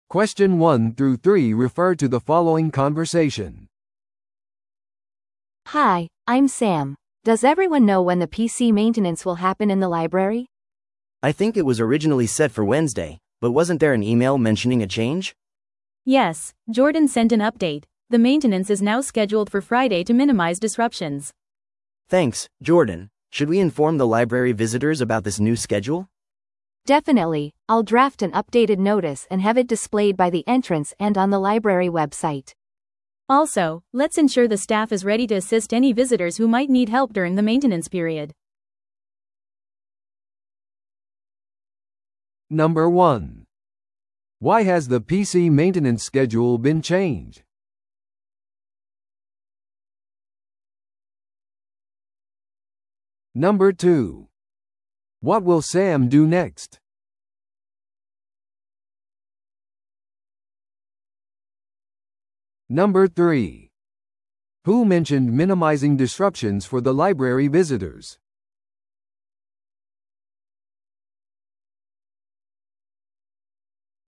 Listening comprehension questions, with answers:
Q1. Why has the PC maintenance schedule been changed?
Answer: 図書館利用者の迷惑を最小限に抑えるため。

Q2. What will Sam do next?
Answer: 更新されたメンテナンス通知を作成して表示する。

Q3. Who mentioned minimizing disruptions for the library visitors?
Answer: メンテナンス更新のメールを送った人。

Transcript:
A: Hi, I'm Sam. Does everyone know when the PC maintenance will happen in the library?
B: I think it was originally set for Wednesday, but wasn't there an email mentioning a change?
C: Yes, Jordan sent an update. The maintenance is now scheduled for Friday to minimize disruptions.
B: Thanks, Jordan. Should we inform the library visitors about this new schedule?
A: Definitely, I'll draft an updated notice and have it displayed by the entrance and on the library website.
C: Also, let's ensure the staff is ready to assist any visitors who might need help during the maintenance period.